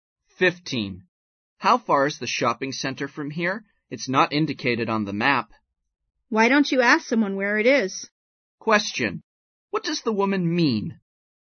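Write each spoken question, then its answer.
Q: What does the woman mean?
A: She doesn't know; he should ask someone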